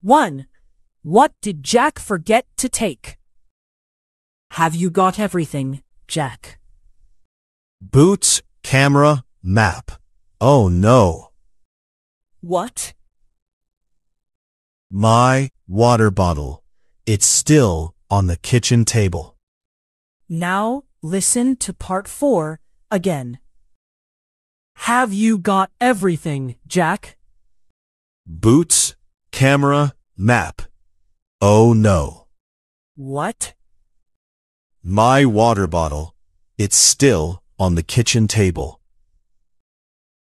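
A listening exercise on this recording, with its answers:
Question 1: What did Jack forget to take?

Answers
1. his water bottle

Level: 劍橋兒童英檢 Flyers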